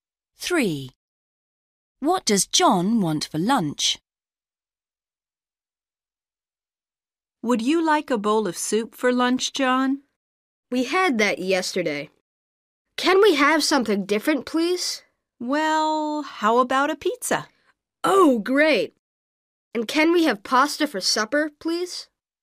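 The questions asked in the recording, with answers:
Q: What does John want for lunch?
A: Pizza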